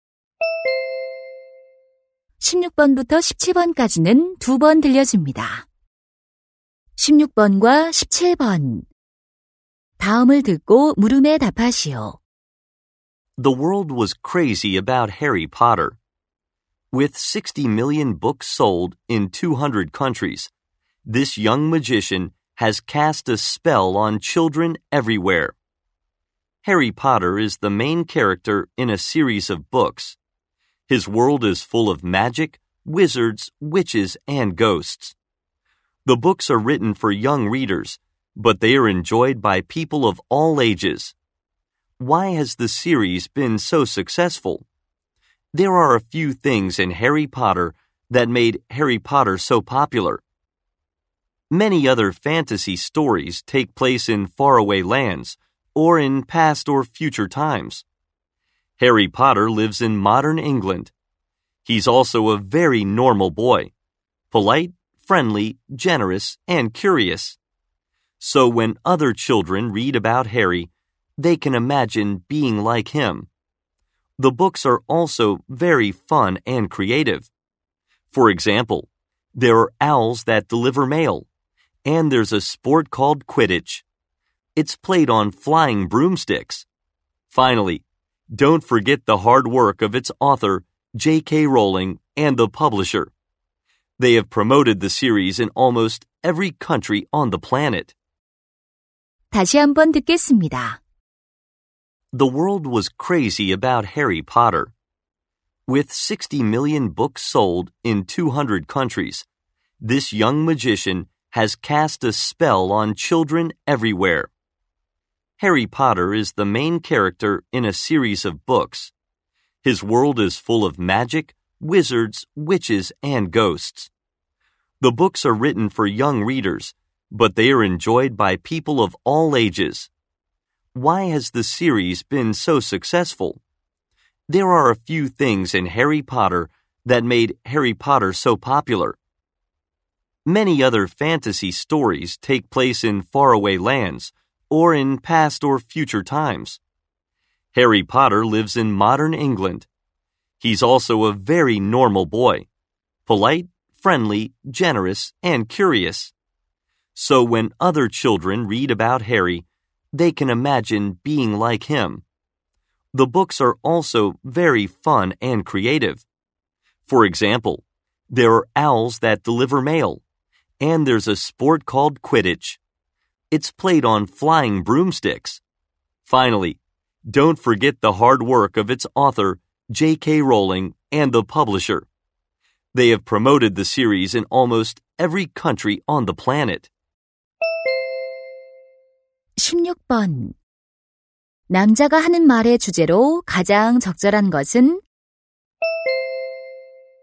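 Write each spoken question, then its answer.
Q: 남자가 하는 말의 주제로 가장 적절한 것은?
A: 해리포터 시리즈가 인기를 얻은 이유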